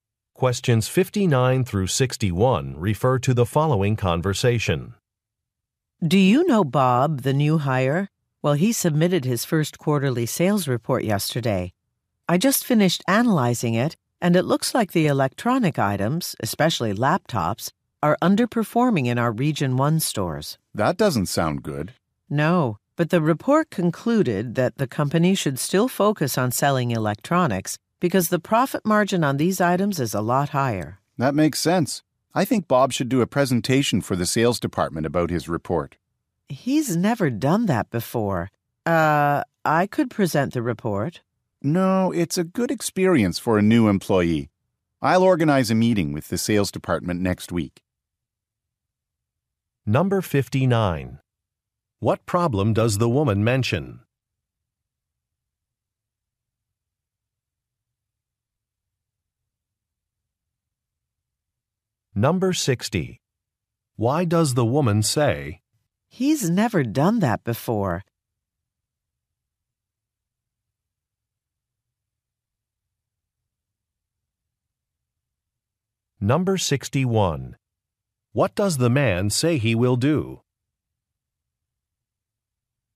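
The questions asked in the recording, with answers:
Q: What problem does the woman mention?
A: Electronics, especially laptops, are underperforming in Region 1 stores

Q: What does the man say he will do?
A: Organize a meeting with the sales department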